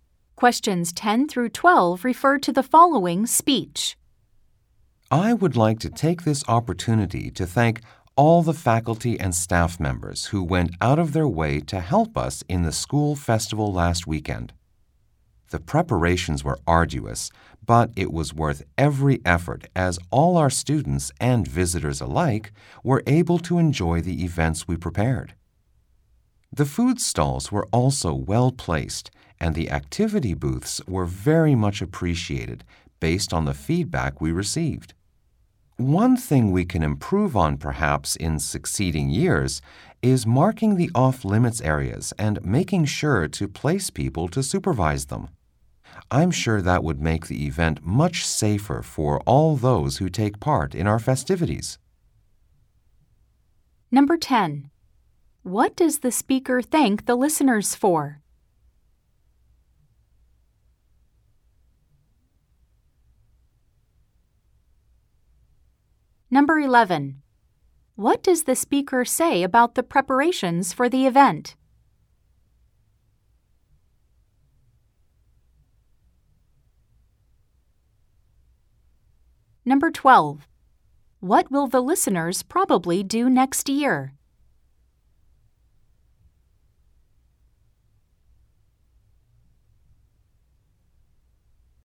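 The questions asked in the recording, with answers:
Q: What does the speaker thank the listeners for?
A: Helping with the school festival last weekend

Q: What does the speaker say about the preparations for the event?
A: They were arduous but worth the effort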